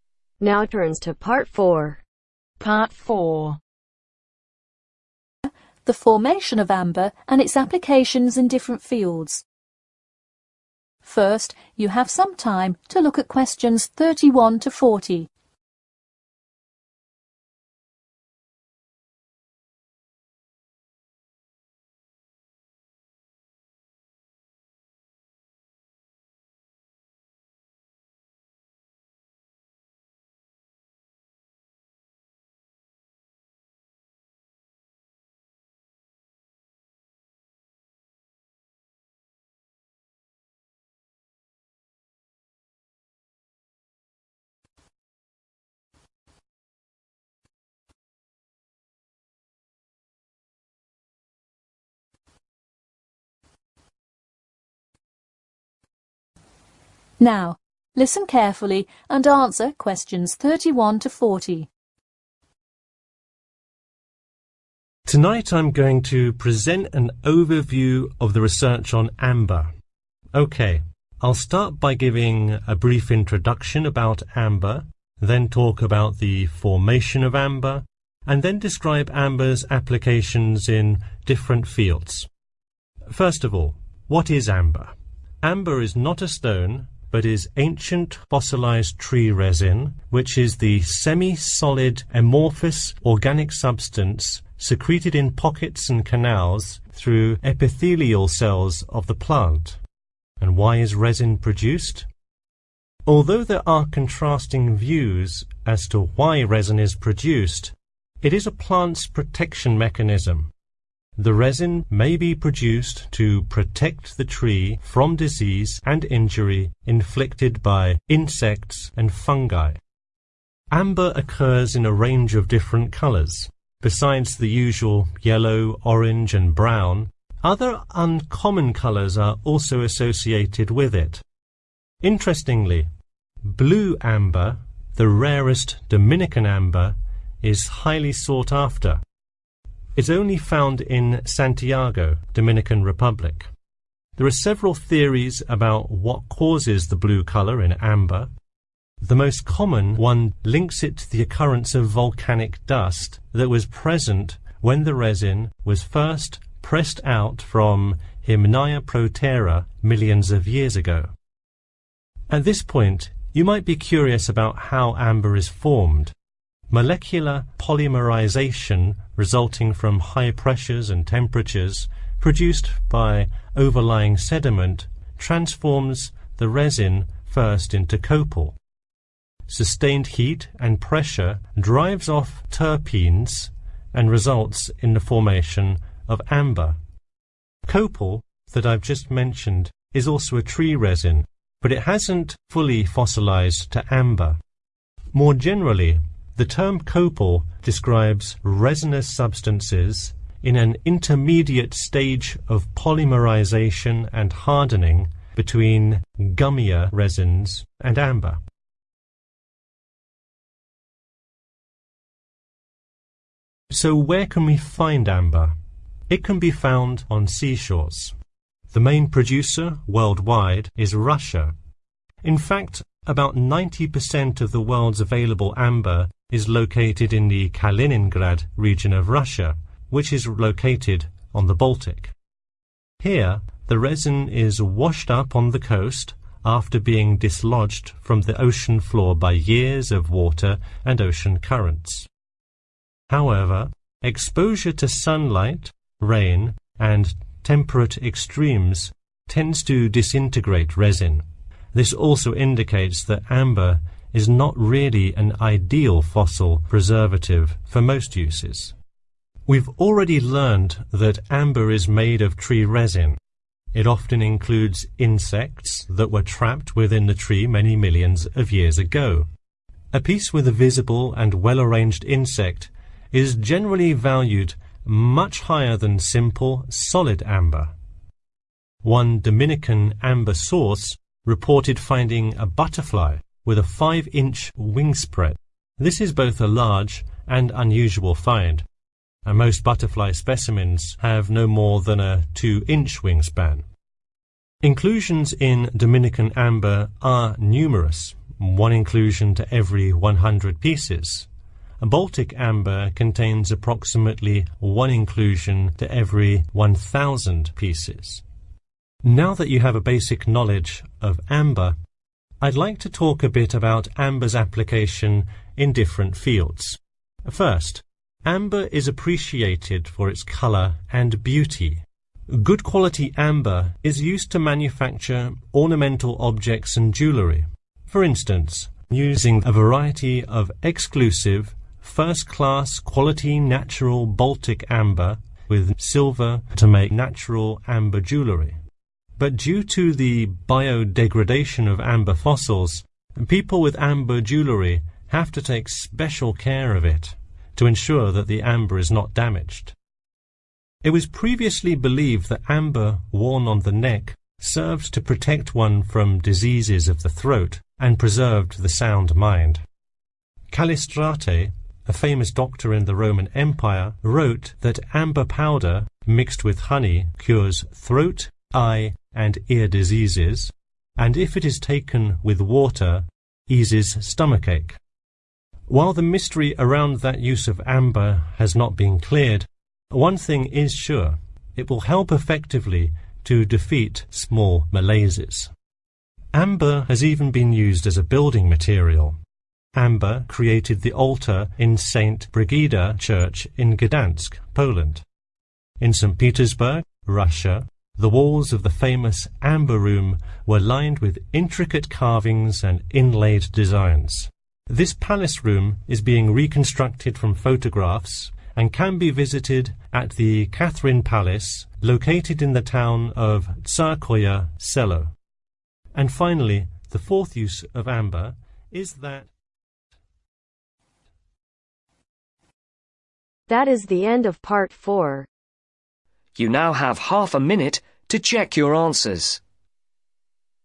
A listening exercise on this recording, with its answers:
Complete the notes below. Write ONE WORD OR NUMBER for each answer.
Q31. 31 ................. and fungi.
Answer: Insects

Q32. the occurrence of 32 ...................... dust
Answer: volcanic

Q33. : under sustained 33 ........................ and pressure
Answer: heat

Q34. : during an 34 ................ Stage between resins and amber, copal is produced.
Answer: intermediate

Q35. : commonly found on 35 ............... e.g. in Russia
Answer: seashores

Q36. : avoid exposure to 36 ..............., rain, and temperate extremes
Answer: sunlight

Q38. : It can be used to make ornamental objects and jewelry in 38 ................... Settings.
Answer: silver

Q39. : Some people believe that its powder mixed with 39 ........... cures throat, eye and ear diseases.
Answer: honey

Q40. : It has even been used as a 40 ........... material, for instance using it to create Amber Room.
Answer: building